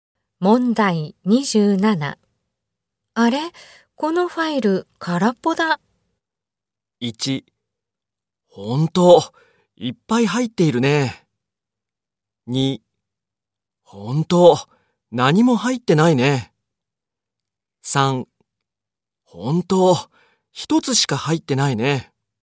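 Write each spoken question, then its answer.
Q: あれ、このファイル空っぽだ。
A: 2: ほんと、何も入ってないね。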